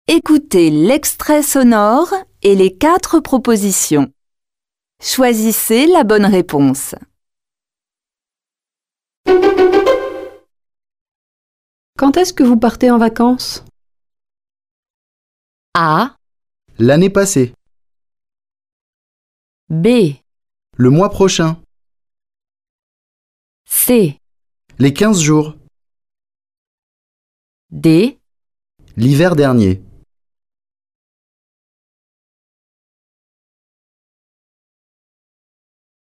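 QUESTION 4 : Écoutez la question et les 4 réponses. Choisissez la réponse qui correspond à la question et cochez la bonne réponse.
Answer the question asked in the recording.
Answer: Le mois prochain.

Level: Tăng dần từ trình độ A1 đến C1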